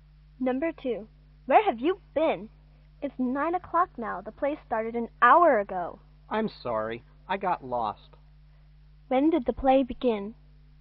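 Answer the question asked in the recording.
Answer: At 8 o'clock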